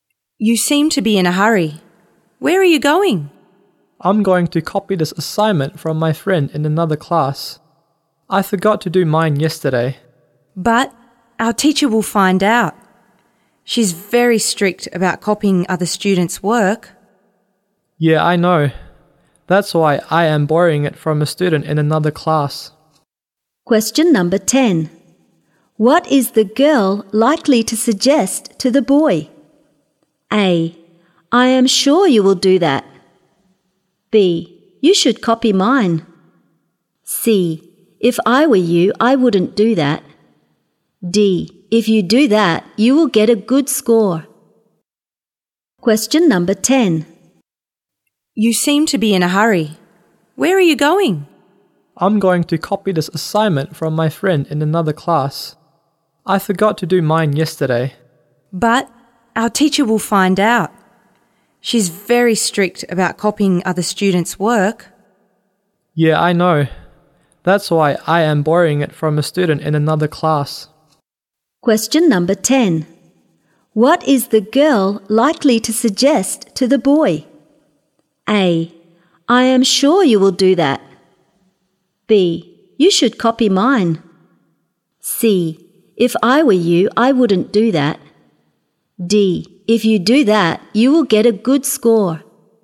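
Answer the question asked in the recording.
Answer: C: If I were you, I wouldn't do that.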